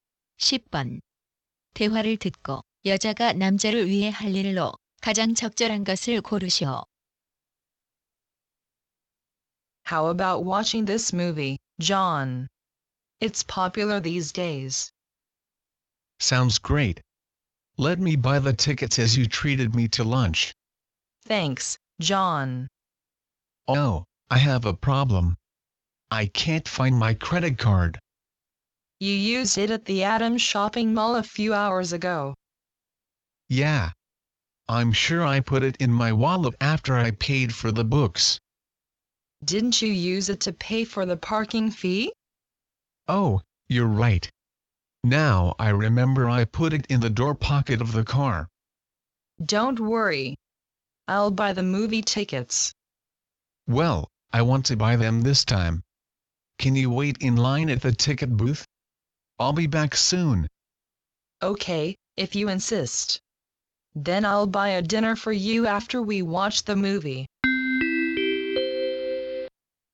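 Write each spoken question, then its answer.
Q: 대화를 듣고 여자가 남자를 위해 할 일로 가장 적절한 것을 고르시오.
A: 매표소에서 줄 서서 기다리기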